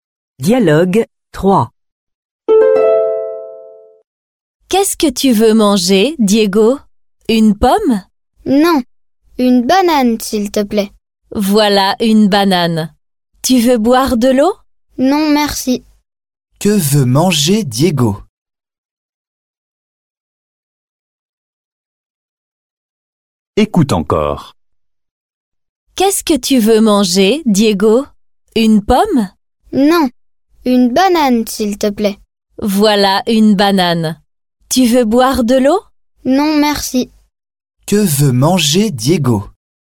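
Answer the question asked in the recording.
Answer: une banane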